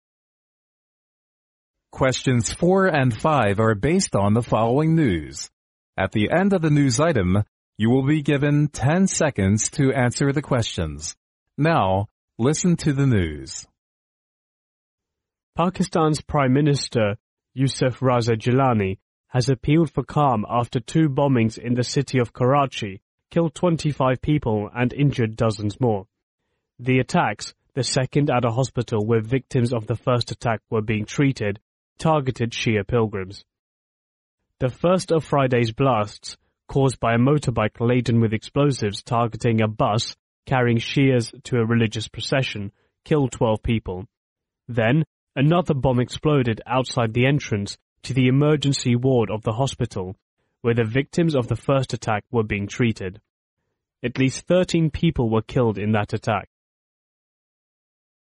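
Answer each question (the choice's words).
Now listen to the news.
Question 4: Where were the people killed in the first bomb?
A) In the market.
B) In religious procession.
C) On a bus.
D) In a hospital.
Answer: On a bus.

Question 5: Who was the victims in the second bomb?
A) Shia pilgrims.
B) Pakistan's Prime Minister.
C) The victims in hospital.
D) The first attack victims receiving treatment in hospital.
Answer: The first attack victims receiving treatment in hospital.

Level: 专业四级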